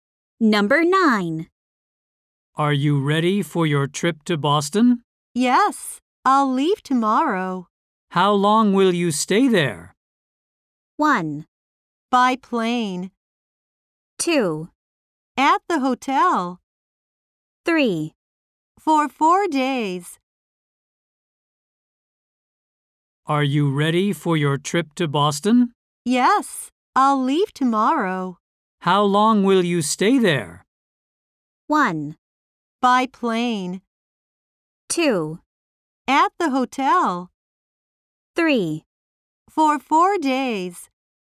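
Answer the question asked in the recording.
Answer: 3: For 4 days.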